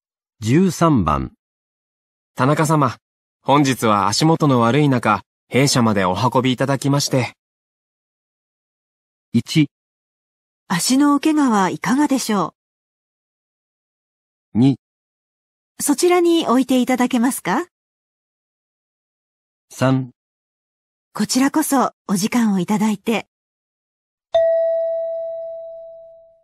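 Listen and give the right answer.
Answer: 3: こちらこそお時間をいただいて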